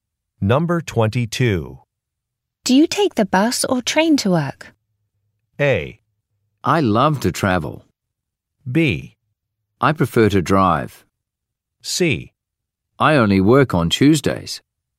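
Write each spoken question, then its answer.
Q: Do you take the bus or train to work?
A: B: I prefer to drive.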